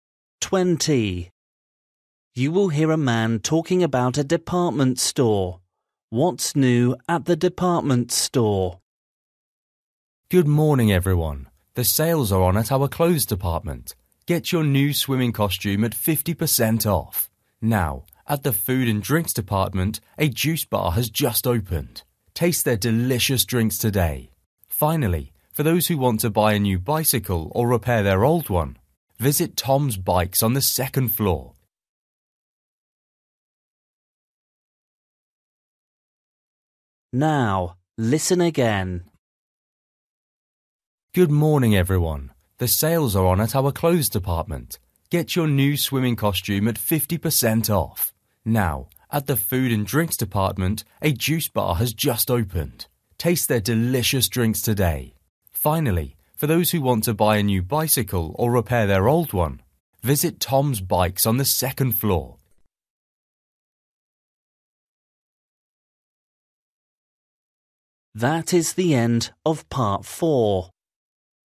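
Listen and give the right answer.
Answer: A juice bar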